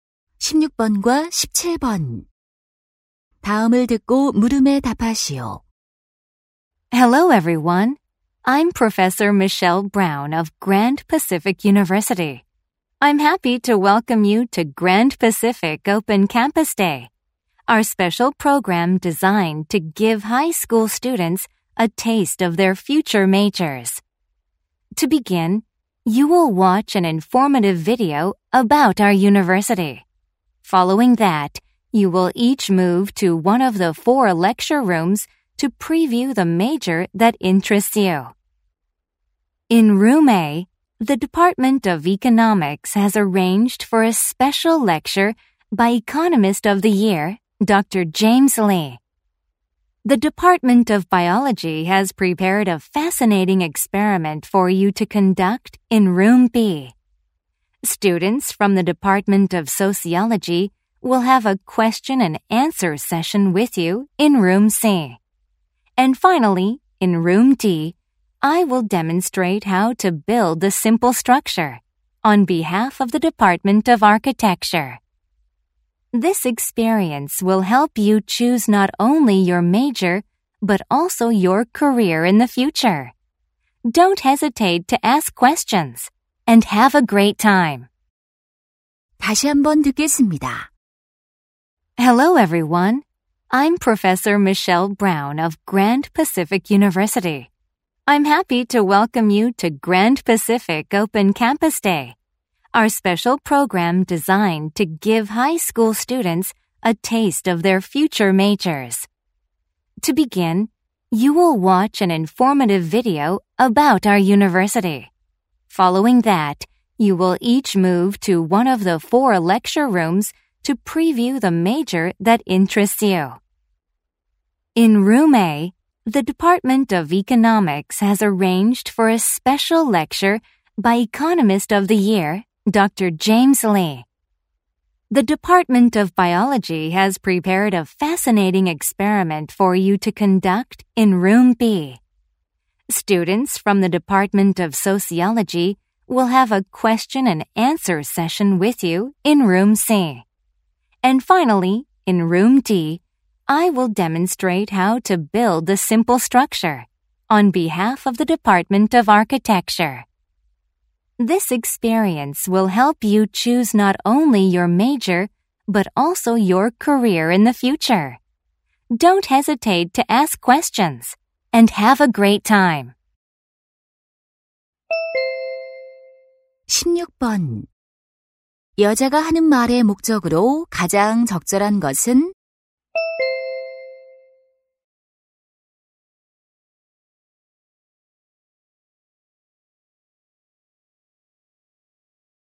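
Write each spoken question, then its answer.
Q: 여자가 하는 말의 목적으로 가장 적절한 것은?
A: 오픈 캠퍼스 데이 프로그램을 안내하려고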